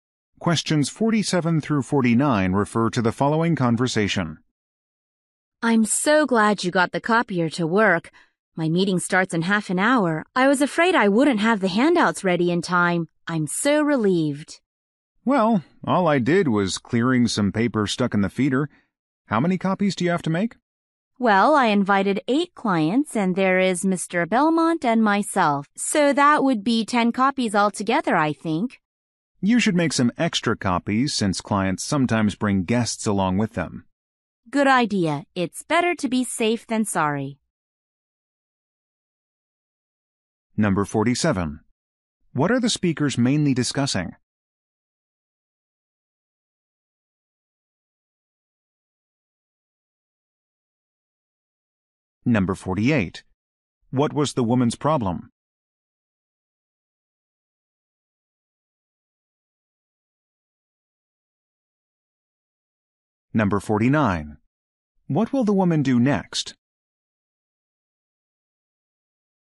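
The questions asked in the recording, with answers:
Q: What are the speakers mainly discussing?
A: Making copies of handouts for a meeting

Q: What was the woman's problem?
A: The copier was not working

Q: What will the woman do next?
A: Make extra copies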